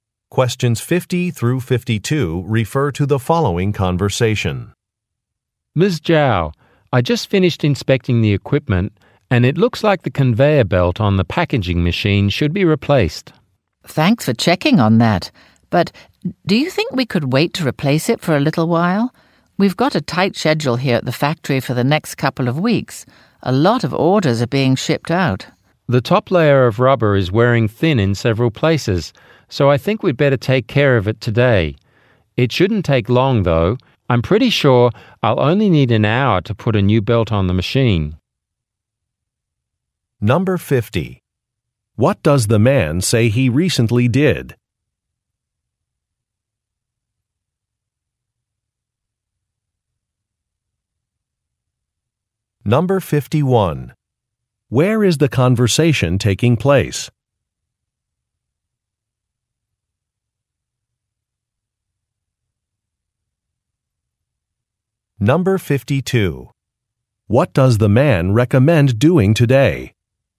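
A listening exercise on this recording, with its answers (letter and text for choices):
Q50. What does the man say he recently did?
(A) Placed an order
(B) Made a delivery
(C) Requested time off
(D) Conducted an inspection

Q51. Where is the conversation taking place?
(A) At an airport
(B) At a construction site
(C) At a factory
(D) At a clothing store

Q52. What does the man recommend doing today?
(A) Confirming a reservation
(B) Replacing a machine part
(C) Hiring additional employees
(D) Reducing some prices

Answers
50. (D) Conducted an inspection
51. (C) At a factory
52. (B) Replacing a machine part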